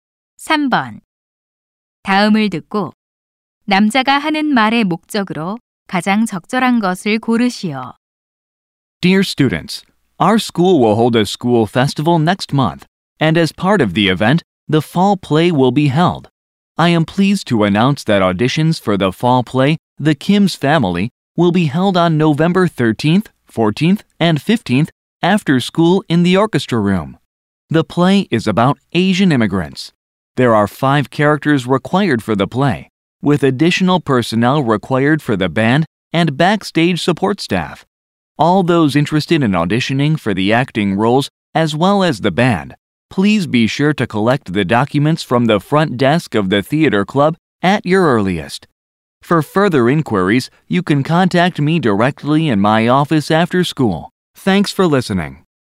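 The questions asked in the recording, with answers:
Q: 다음을 듣고 남자가 하는 말의 목적으로 가장 적절한 것을 고르시오.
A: 연극 오디션 일정을 알리려고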